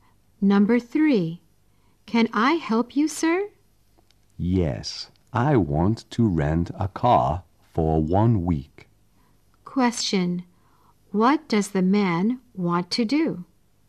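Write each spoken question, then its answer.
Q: What does the man want to do?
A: Rent a car for 1 week.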